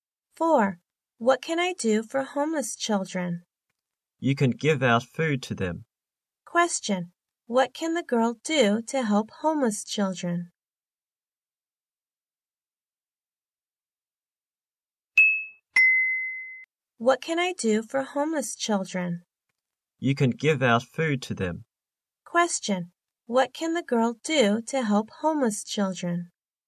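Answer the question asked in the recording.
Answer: Give out food to them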